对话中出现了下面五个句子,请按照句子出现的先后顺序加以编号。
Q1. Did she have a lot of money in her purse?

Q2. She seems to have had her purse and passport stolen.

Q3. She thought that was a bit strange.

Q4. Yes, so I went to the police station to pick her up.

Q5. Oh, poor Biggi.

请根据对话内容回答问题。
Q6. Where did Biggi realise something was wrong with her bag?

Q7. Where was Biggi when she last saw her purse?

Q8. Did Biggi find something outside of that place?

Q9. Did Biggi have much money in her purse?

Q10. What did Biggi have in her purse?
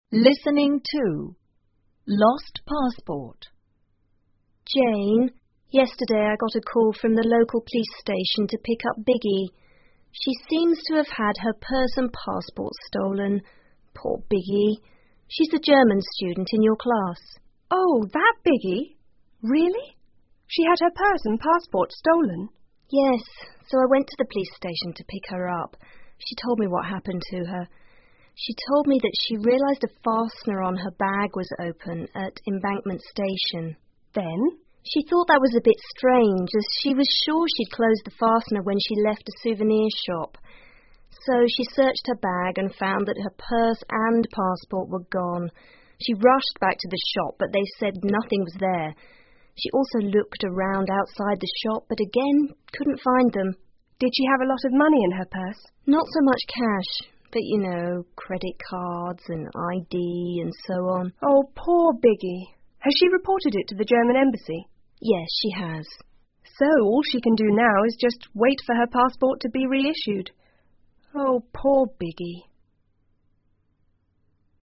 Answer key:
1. 4
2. 1
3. 3
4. 2
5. 5
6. At the Embankment Station
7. At a souvernir shop
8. No
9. No
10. Some cash/credit cards/ ID

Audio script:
Eleanor:Jane,yesterday I got a call from the local police station to pick up Biggi.She seems to have had her purse and passport stolen.Poor Biggi.She's the German student in your class.
Jane:Oh,that Biggi?Really?She had her purse and passport stolen?
E:Yes,so I went to the police station to pick her up.She told me what happened to her.She told me that she realised a fastener on her bag was open at Embankment Station.
J:Then?
E:She thought that was a bit strange,as she was sure she'd closed the fastener when she left a souvenir shop.So she searched her bag and found that her purse and passport were gone.She rushed back to the shop but they said nothing was there.She also looked around outside the shop,but again,couldn't find them.
J:Did she have a lot of money in her purse?
E:Not so much cash.But you know,credit cards and ID and so on...
J:Oh,poor Biggi.Has she reported it to the German Embassy?
E:Yes,she has.
J:So all she can do now is just wait for her passport to be reissued...oh,poor Biggi.